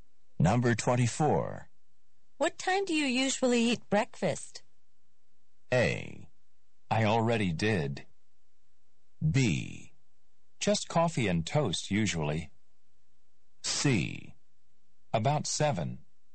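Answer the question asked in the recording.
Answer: C: About 7.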